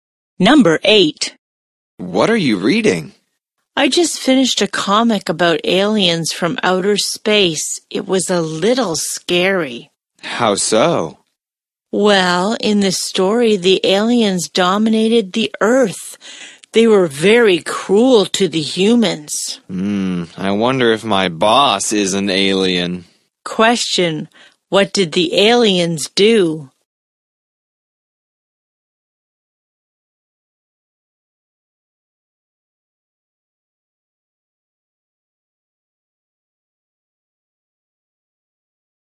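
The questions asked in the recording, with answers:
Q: Question, what did the aliens do?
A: They dominated the Earth and were cruel to humans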